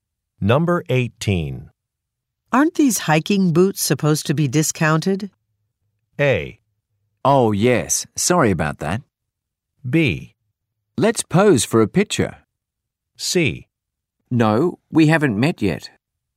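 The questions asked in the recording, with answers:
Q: Aren't these hiking boots supposed to be discounted?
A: A: Oh, yes. Sorry about that.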